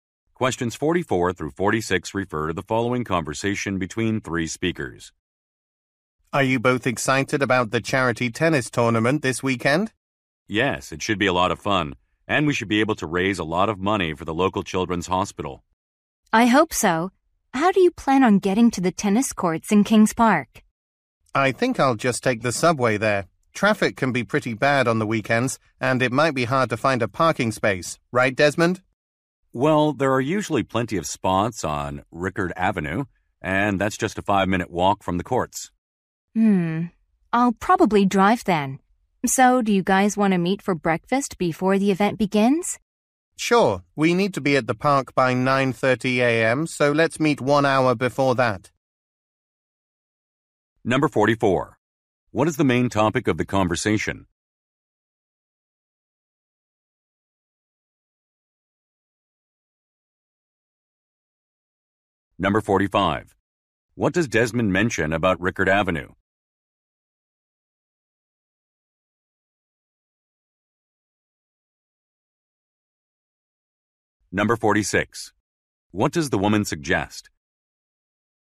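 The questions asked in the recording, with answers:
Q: What is the main topic of the conversation?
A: A charity tennis tournament

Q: What does Desmond mention about Rickard Avenue?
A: It usually has plenty of parking spots

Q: What does the woman suggest?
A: Meeting for breakfast at 8:30 before the event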